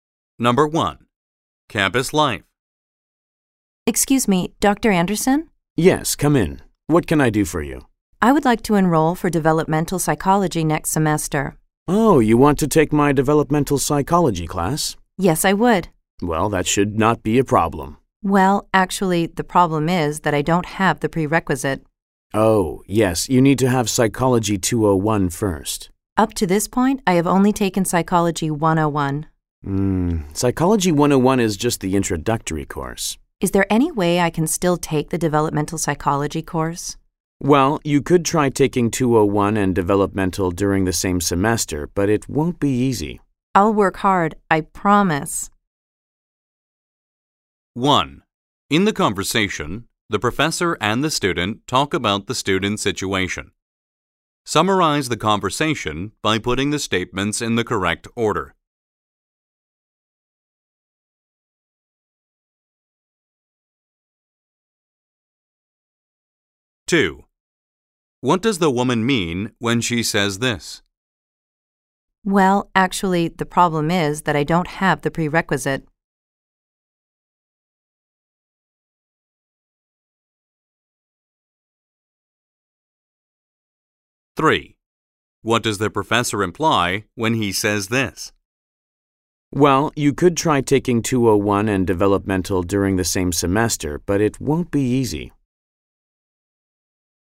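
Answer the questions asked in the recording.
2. She hasn't taken the required course (Psychology 201), so she may not be allowed to enroll.
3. She may take both courses at once, but it will be difficult.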